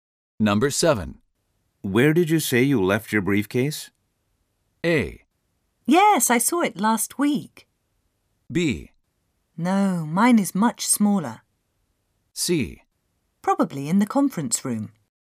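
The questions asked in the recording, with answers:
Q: Where did you say you left your briefcase?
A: C: Probably in the conference room.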